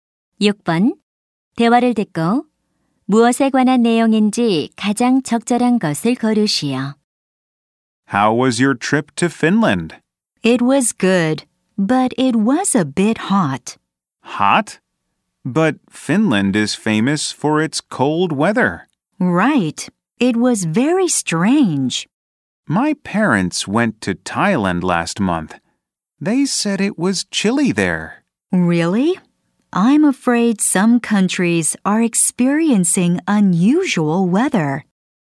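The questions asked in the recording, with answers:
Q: 대화를 듣고 무엇에 관한 내용인지 가장 적절한 것을 고르시오.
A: 이상 기후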